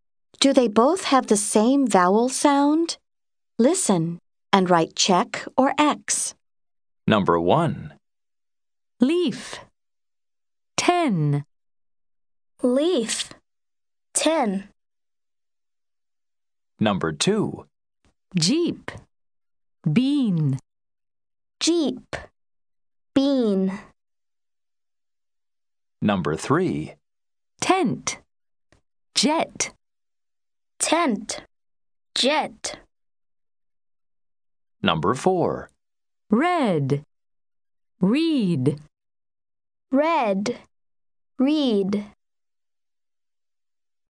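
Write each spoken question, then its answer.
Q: Do they both have the same vowel sound?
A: No (X): leaf / ten

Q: Do they both have the same vowel sound?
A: Yes (check): jeep / bean

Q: Do they both have the same vowel sound?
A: Yes (check): tent / jet

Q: Do they both have the same vowel sound?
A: No (X): red / reed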